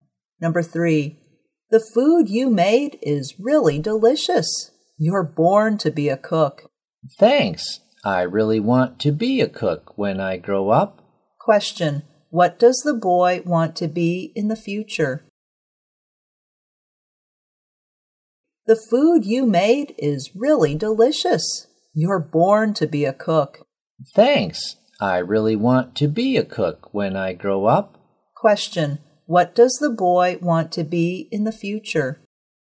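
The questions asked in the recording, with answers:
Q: Question, what does the boy want to be in the future?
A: A cook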